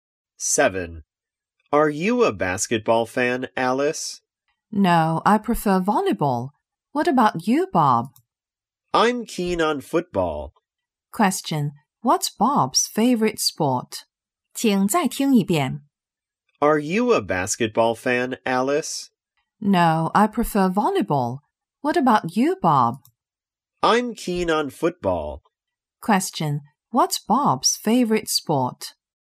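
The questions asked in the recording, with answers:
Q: Question, what's Bob's favorite sport?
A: Football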